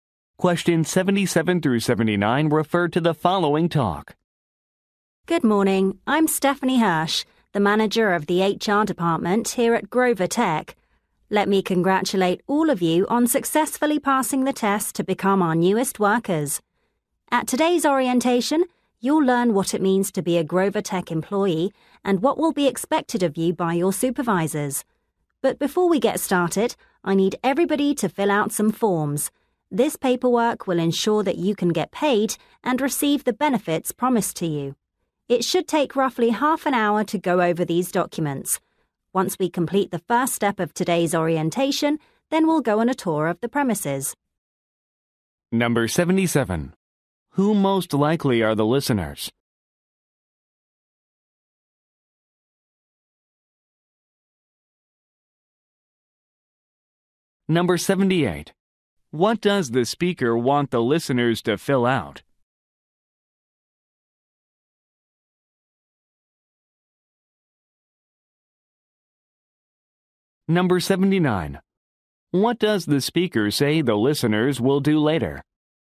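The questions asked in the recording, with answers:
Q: Who most likely are the listeners?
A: New employees

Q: What does the speaker want the listeners to fill out?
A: Forms for pay and benefits

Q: What does the speaker say the listeners will do later?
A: Tour the premises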